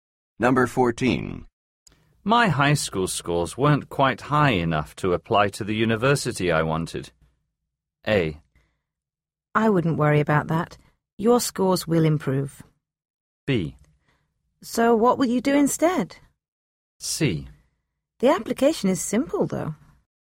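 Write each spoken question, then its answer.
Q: My high school scores weren't quite high enough to apply to the university I wanted.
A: B: So what will you do instead?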